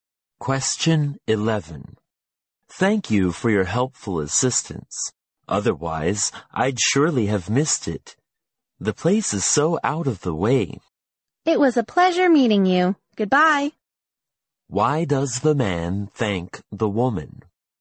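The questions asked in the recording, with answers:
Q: Why does the man thank the woman?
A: She helped him find a place that is hard to find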